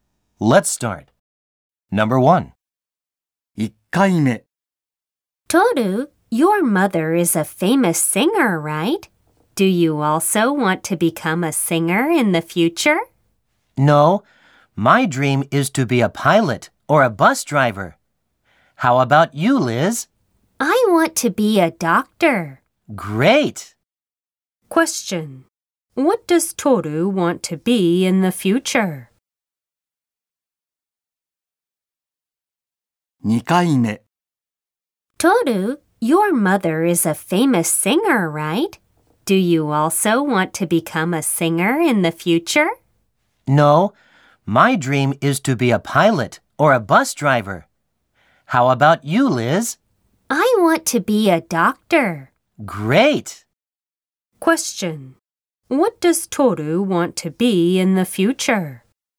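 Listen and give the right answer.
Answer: A pilot or a bus driver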